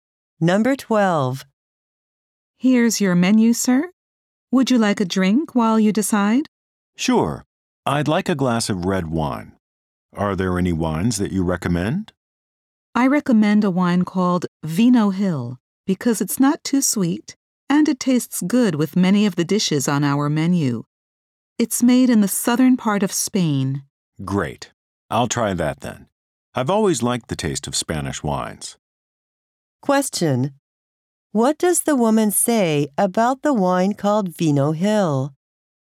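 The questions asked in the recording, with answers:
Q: What does the woman say about the wine called Vino Hill?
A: It's not too sweet and goes well with many dishes; it's from southern Spain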